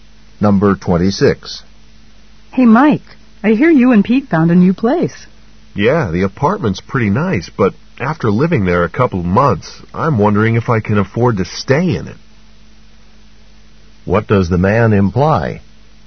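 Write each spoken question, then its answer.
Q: What does the man imply?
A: The apartment may cost too much for him.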